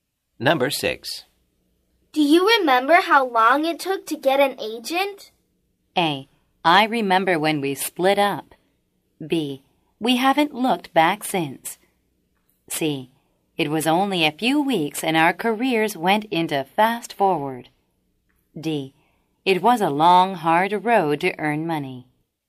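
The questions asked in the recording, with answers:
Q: Do you remember how long it took to get an agent?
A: C: It was only a few weeks and our careers went into fast forward.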